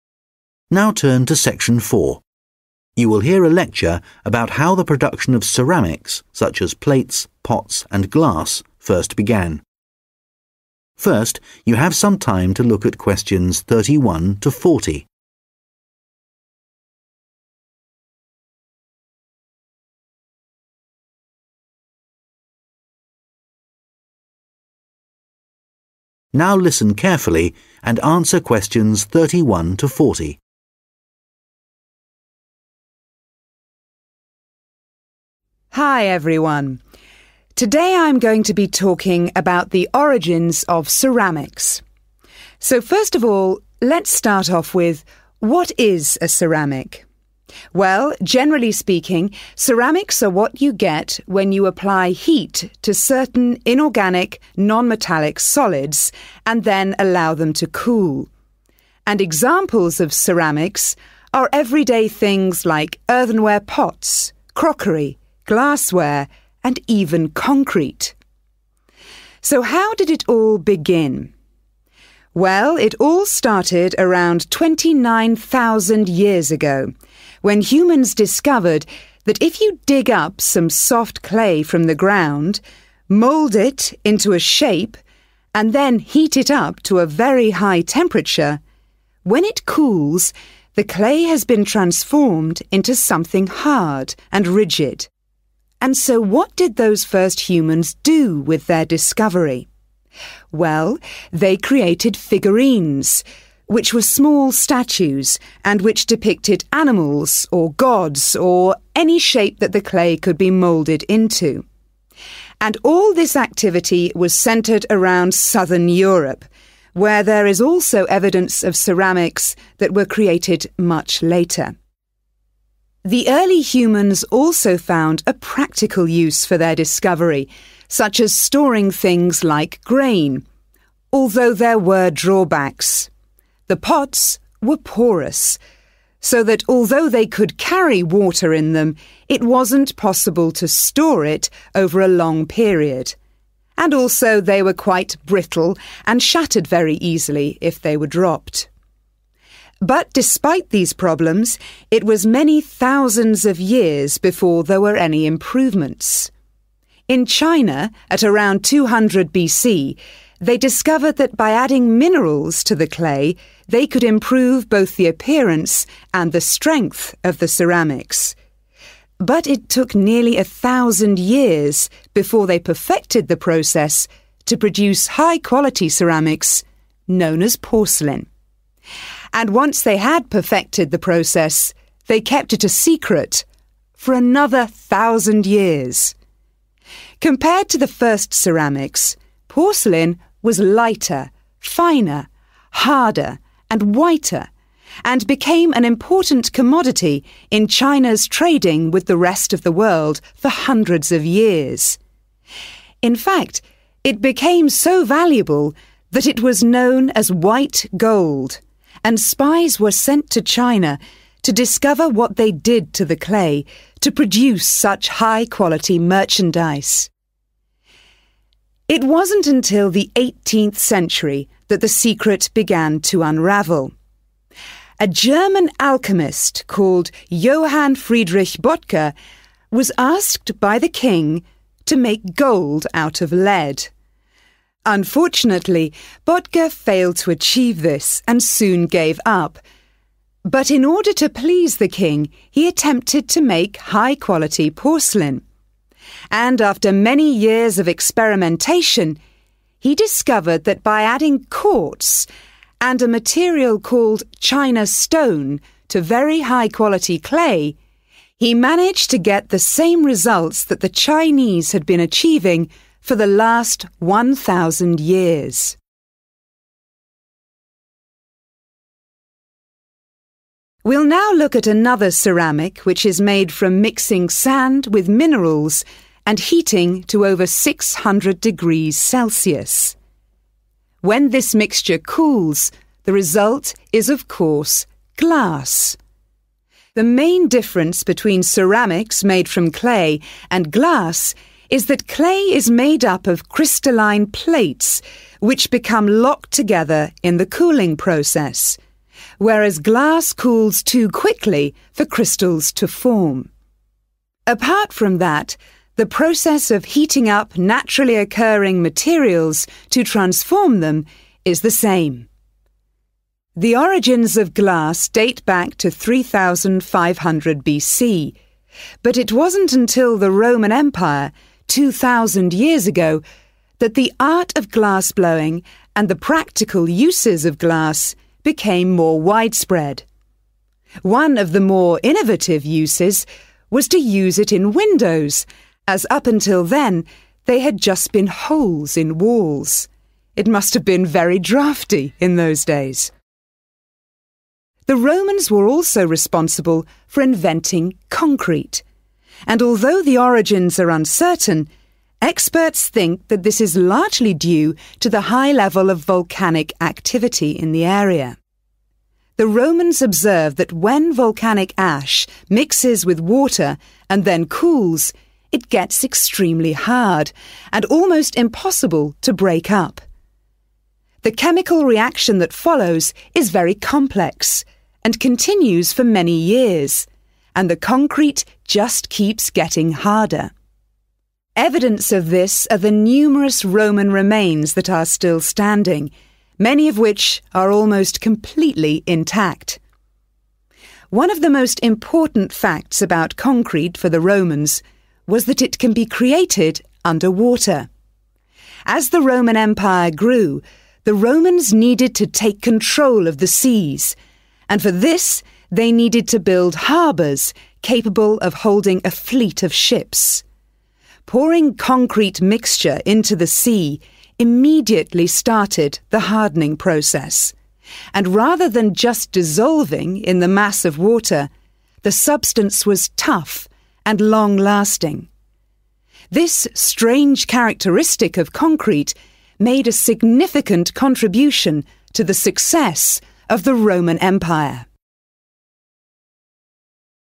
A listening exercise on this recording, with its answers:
Questions 31-40 Complete the sentences below. Write NO MORE THAN TWO WORDS AND/OR A NUMBER for each answer.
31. Ceramics date back approximately 31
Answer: 29,000 years

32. The first figurines were made in the area of 32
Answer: southern Europe